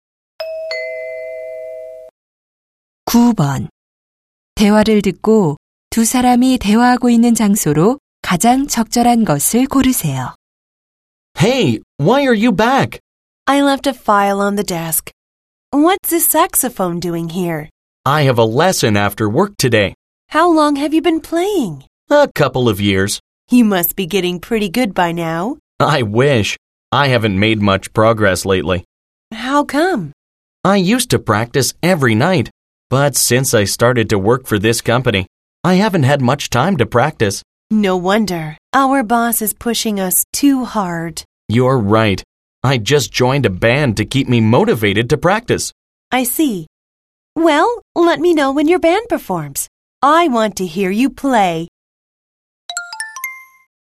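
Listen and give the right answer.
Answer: 사무실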